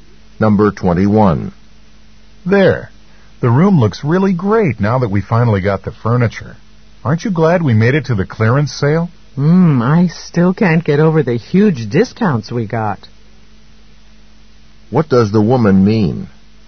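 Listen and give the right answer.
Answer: She is very pleased with how much they saved.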